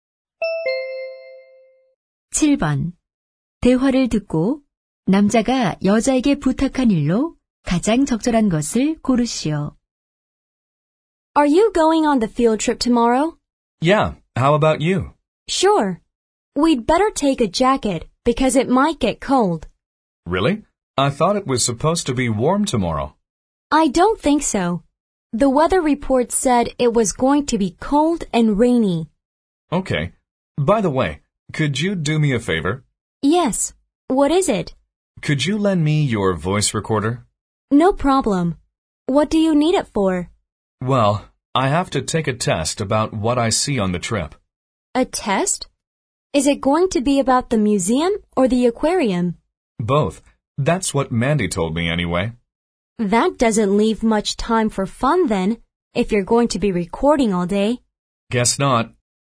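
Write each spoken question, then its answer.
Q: 대화를 듣고 남자가 여자에게 부탁한 일로 가장 적절한 것을 고르시오.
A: 음성 녹음기 빌려주기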